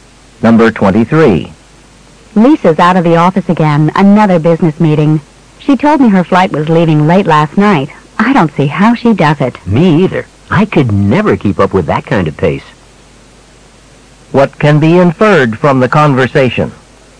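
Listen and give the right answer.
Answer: Lisa has a very busy schedule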